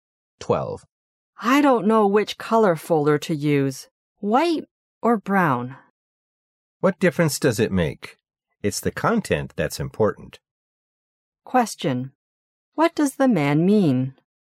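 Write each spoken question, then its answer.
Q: What does the man mean?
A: The folder's color doesn't matter; the content is what matters.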